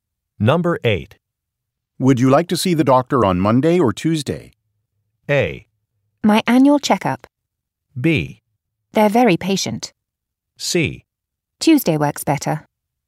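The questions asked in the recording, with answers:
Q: Would you like to see the doctor on Monday or Tuesday?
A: C: Tuesday works better.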